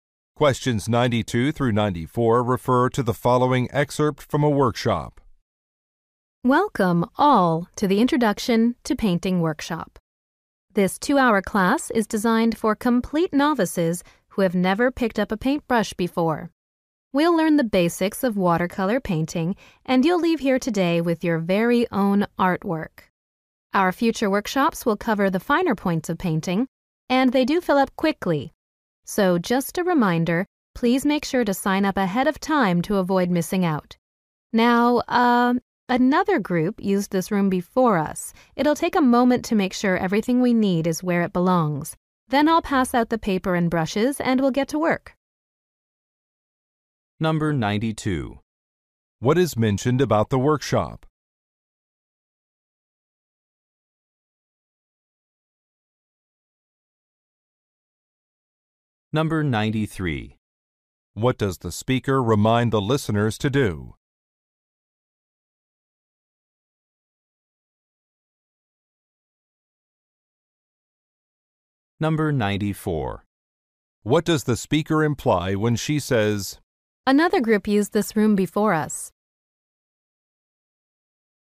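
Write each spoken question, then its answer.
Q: What is mentioned about the workshop?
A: It is for complete beginners

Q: What does the speaker remind the listeners to do?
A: Sign up early for future workshops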